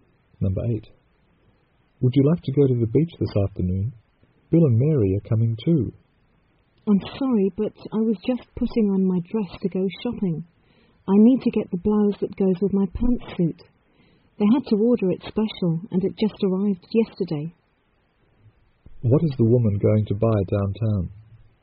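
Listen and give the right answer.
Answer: A blouse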